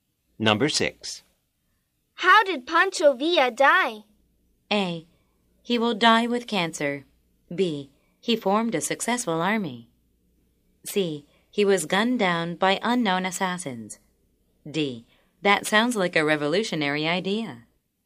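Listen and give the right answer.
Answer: C: He was gunned down by unknown assassins.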